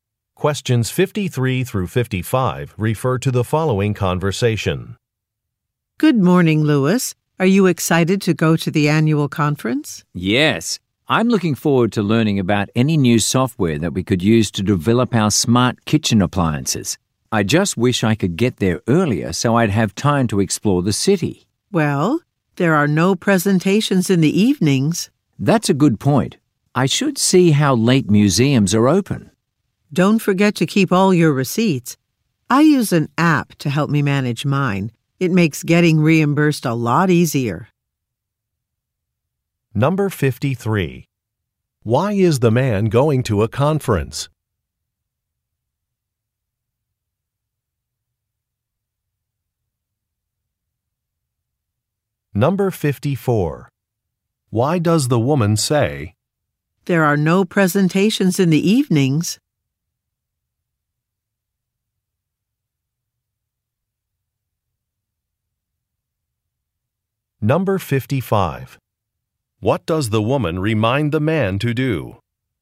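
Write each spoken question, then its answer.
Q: Why is the man going to a conference?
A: To learn about new software for smart kitchen appliances

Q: "There are no presentations in the evenings"?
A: He will have time to explore the city in the evenings

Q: What does the woman remind the man to do?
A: Keep all his receipts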